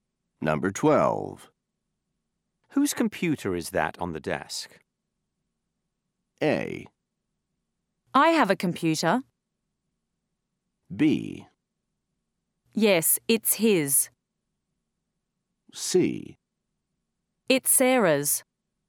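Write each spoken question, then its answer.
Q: Whose computer is that on the desk?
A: C: It's Sarah's.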